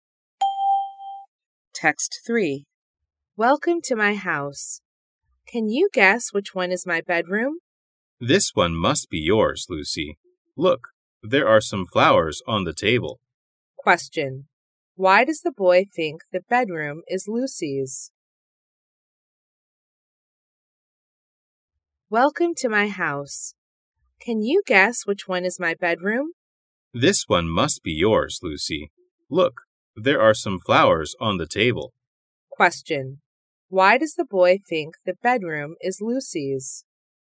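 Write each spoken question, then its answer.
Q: Why does the boy think the bedroom is Lucy's?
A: There are some flowers on the table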